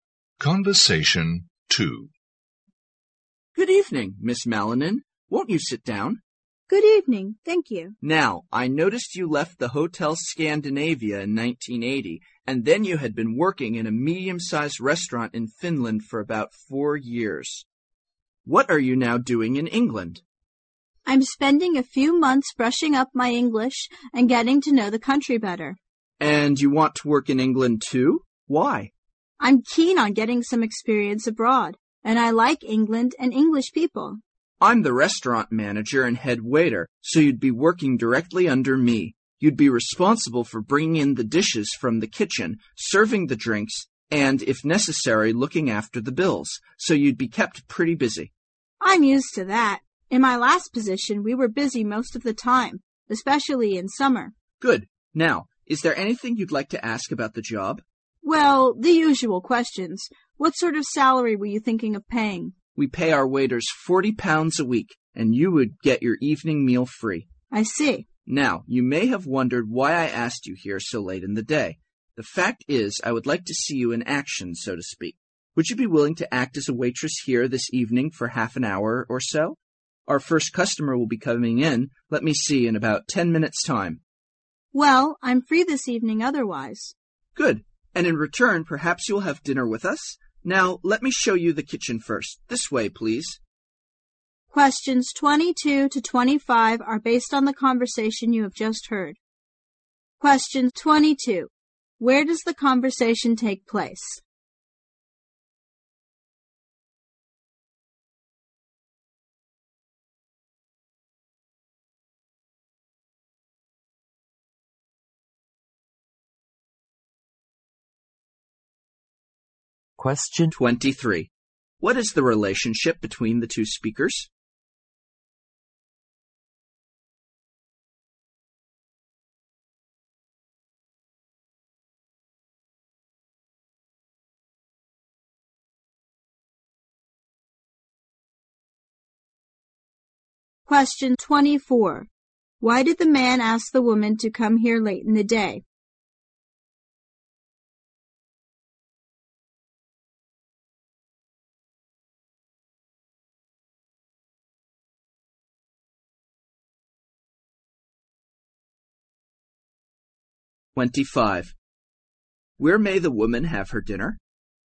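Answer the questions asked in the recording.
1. In a restaurant in England
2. Restaurant manager and job applicant
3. To see her working as a waitress
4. At the restaurant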